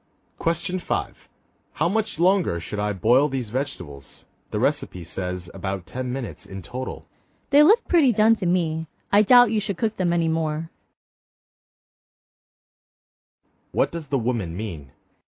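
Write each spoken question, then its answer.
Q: What does the woman mean?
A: The vegetables are done and shouldn't be boiled any longer.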